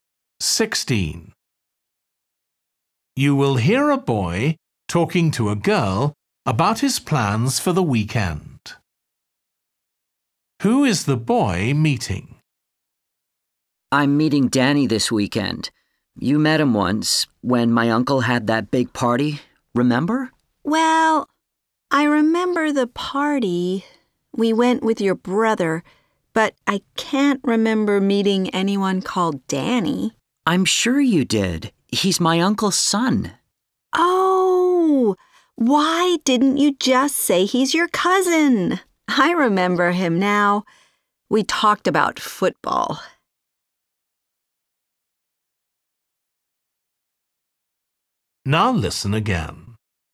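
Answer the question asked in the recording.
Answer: His cousin Danny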